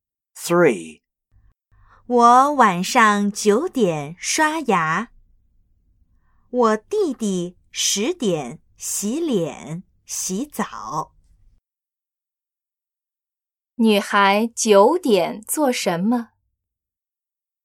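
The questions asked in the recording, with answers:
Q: 女孩九点做什么?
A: 刷牙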